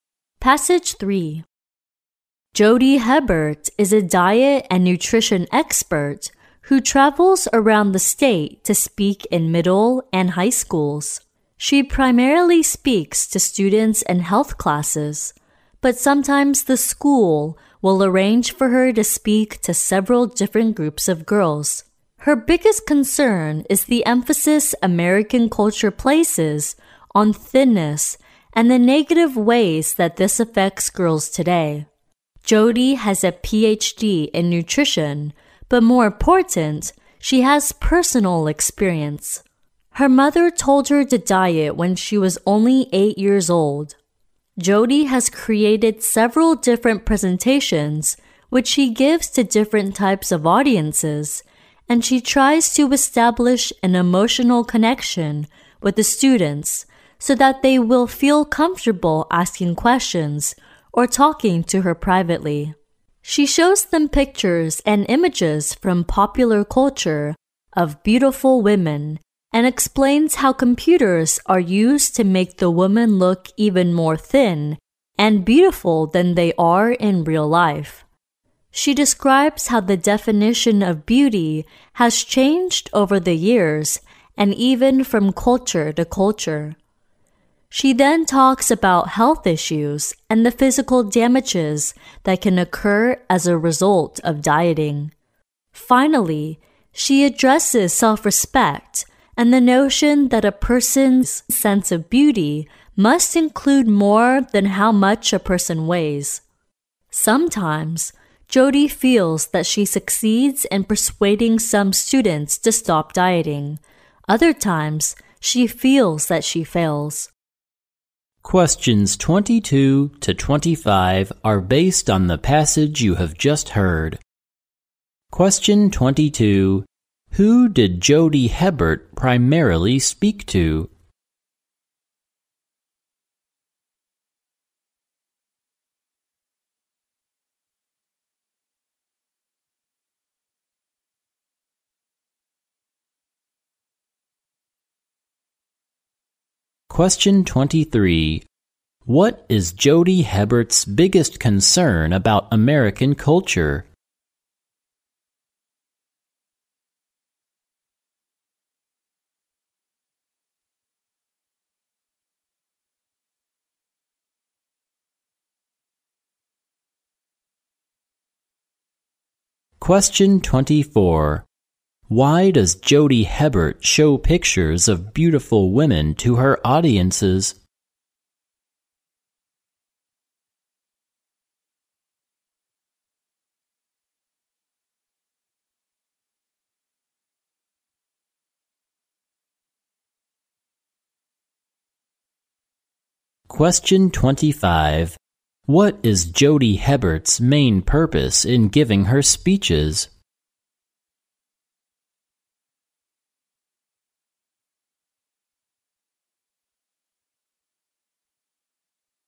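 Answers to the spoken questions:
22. Students in health classes
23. Its emphasis on thinness and how it negatively affects girls
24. To show how computers make women look thinner and more beautiful than in real life
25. To persuade girls to stop dieting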